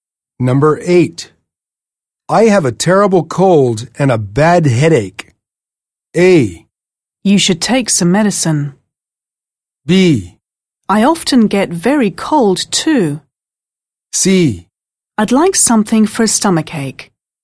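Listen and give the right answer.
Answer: A: You should take some medicine.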